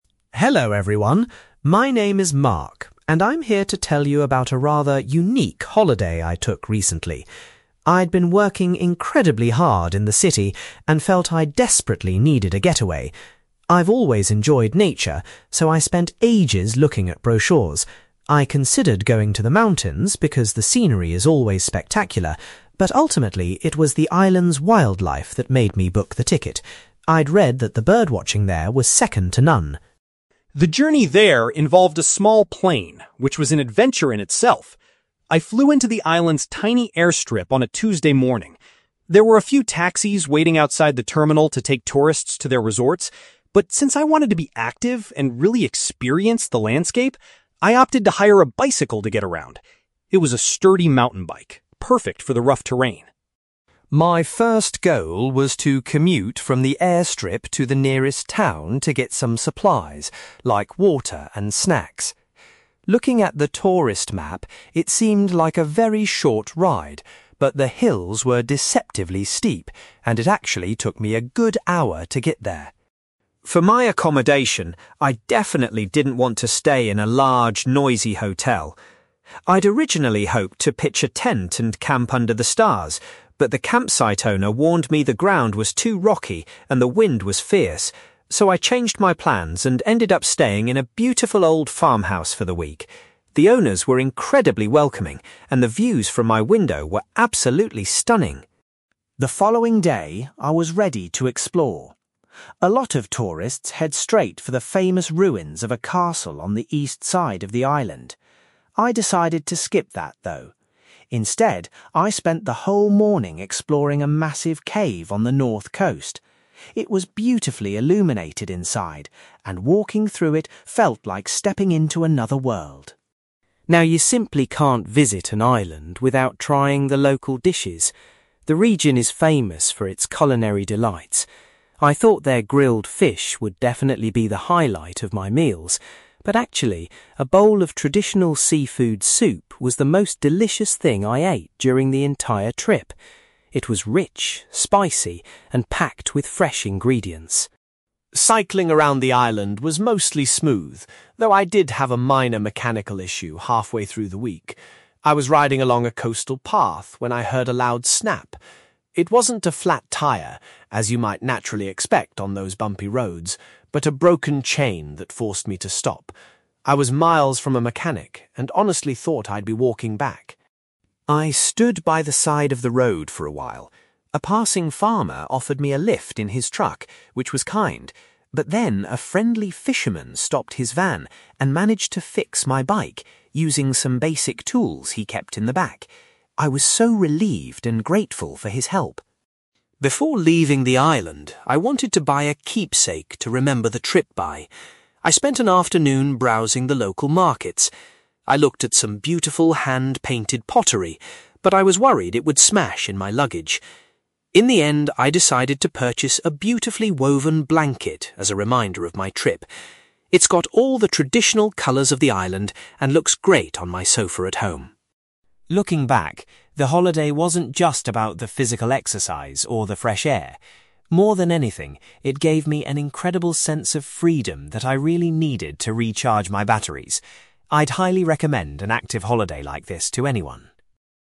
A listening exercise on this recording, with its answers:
You will hear a man called Mark giving a presentation about a cycling holiday he recently took on an island. For questions 9-18, complete the sentences with a word or short phrase.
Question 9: Mark decided to visit the island primarily because he was interested in its (9)........................... .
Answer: wildlife

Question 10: Rather than taking a taxi, Mark chose to rent a (10)........................... at the airstrip.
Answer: bicycle

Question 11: Mark's first journey was from the airport to a nearby (11)........................... to buy necessities.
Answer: town

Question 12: Mark was happy to spend his holiday sleeping in a (12)........................... instead of a hotel.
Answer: farmhouse

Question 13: On his second day, Mark enjoyed going inside a (13)........................... situated on the coast.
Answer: cave

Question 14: Mark found that a dish of (14)........................... was the tastiest local food he tried.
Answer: seafood soup

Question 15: Mark's cycling trip was interrupted when he had to deal with a (15)........................... on his bike.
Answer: broken chain

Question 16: Mark was very grateful when a local (16)........................... helped him repair his bicycle.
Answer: fisherman

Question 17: As a souvenir of his holiday, Mark chose to take home a (17)........................... .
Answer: woven blanket

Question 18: Mark says that the trip provided him with a feeling of (18)........................... above all else.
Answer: freedom

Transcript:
Mark: Hello everyone! My name is Mark, and I'm here to tell you about a rather unique holiday I took recently. I'd been working incredibly hard in the city and felt I desperately needed a getaway. I've always enjoyed nature, so I spent ages looking at brochures. I considered going to the mountains because the scenery is always spectacular, but ultimately, it was the island's wildlife that made me book the ticket. I'd read that the birdwatching there was second to none.
The journey there involved a small plane, which was an adventure in itself. I flew into the island's tiny airstrip on a Tuesday morning. There were a few taxis waiting outside the terminal to take tourists to their resorts, but since I wanted to be active and really experience the landscape, I opted to hire a bicycle to get around. It was a sturdy mountain bike, perfect for the rough terrain.
My first goal was to commute from the airstrip to the nearest town to get some supplies, like water and snacks. Looking at the tourist map, it seemed like a very short ride, but the hills were deceptively steep, and it actually took me a good hour to get there.
For my accommodation, I definitely didn't want to stay in a large, noisy hotel. I'd originally hoped to pitch a tent and camp under the stars, but the campsite owner warned me the ground was too rocky and the wind was fierce. So, I changed my plans and ended up staying in a beautiful old farmhouse for the week. The owners were incredibly welcoming, and the views from my window were absolutely stunning.
The following day, I was ready to explore. A lot of tourists head straight for the famous ruins of a castle on the east side of the island. I decided to skip that, though. Instead, I spent the whole morning exploring a massive cave on the north coast. It was beautifully illuminated inside, and walking through it felt like stepping into another world.
Now, you simply can't visit an island without trying the local dishes. The region is famous for its culinary delights. I thought their grilled fish would definitely be the highlight of my meals, but actually, a bowl of traditional seafood soup was the most delicious thing I ate during the entire trip. It was rich, spicy, and packed with fresh ingredients.
Cycling around the island was mostly smooth, though I did have a minor mechanical issue halfway through the week. I was riding along a coastal path when I heard a loud snap. It wasn't a flat tyre, as you might naturally expect on those bumpy roads, but a broken chain that forced me to stop. I was miles from a mechanic and honestly thought I'd be walking back.
I stood by the side of the road for a while. A passing farmer offered me a lift in his truck, which was kind, but then a friendly fisherman stopped his van and managed to fix my bike using some basic tools he kept in the back. I was so relieved and grateful for his help!
Before leaving the island, I wanted to buy a keepsake to remember the trip by. I spent an afternoon browsing the local markets. I looked at some beautiful hand-painted pottery, but I was worried it would smash in my luggage. In the end, I decided to purchase a beautifully woven blanket as a reminder of my trip. It's got all the traditional colours of the island and looks great on my sofa at home.
Looking back, the holiday wasn't just about the physical exercise or the fresh air. More than anything, it gave me an incredible sense of freedom that I really needed to recharge my batteries. I'd highly recommend an active holiday like this to anyone!

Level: B2